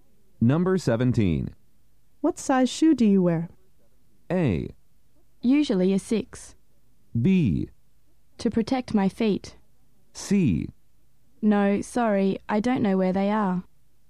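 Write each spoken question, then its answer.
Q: What size shoe do you wear?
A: A: Usually a 6.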